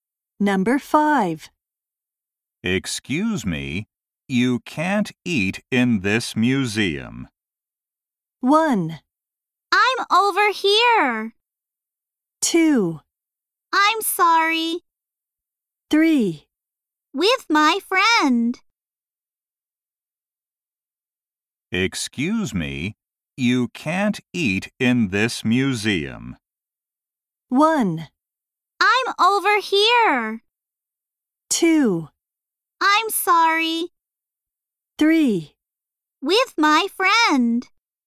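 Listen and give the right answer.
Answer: 2: I'm sorry.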